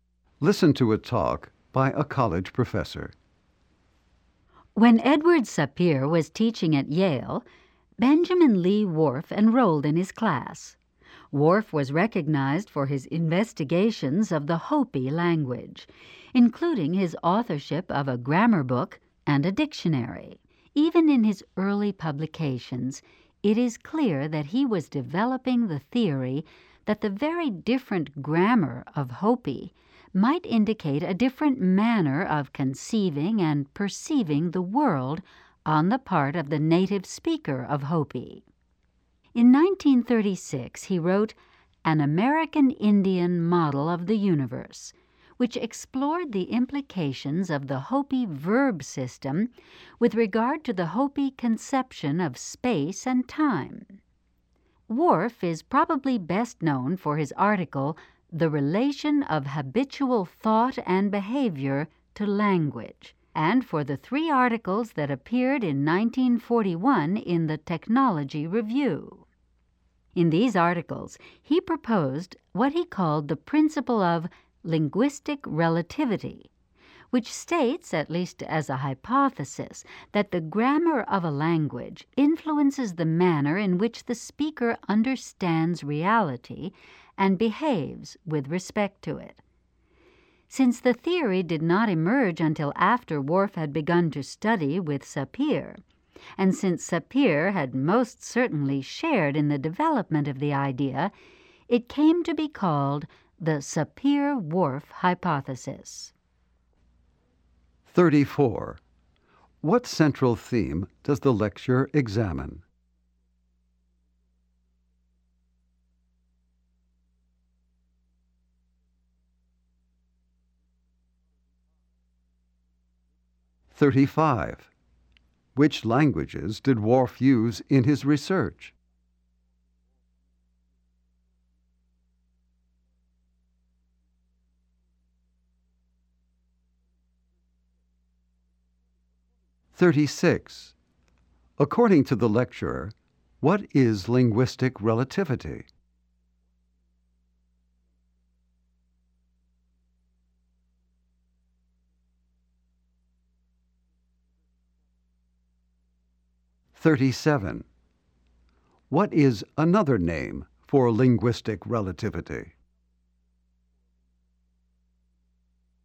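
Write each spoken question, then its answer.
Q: What central theme does the lecture examine?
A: Whorf's work and the Sapir-Whorf hypothesis of linguistic relativity.

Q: According to the lecturer, what is linguistic relativity?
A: The idea that a language's grammar influences how speakers understand reality and behave.

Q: What is another name for linguistic relativity?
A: The Sapir-Whorf hypothesis.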